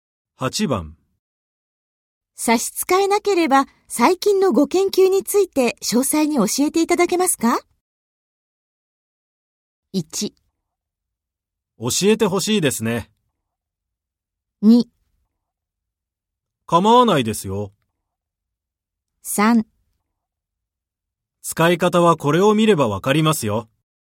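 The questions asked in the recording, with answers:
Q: 差し支えなければ、最近のご研究について詳細に教えていただけますか?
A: 2: 構わないですよ。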